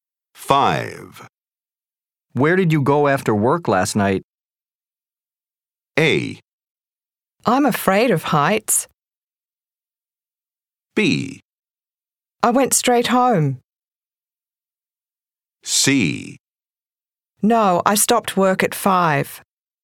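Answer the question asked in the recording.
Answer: B: I went straight home.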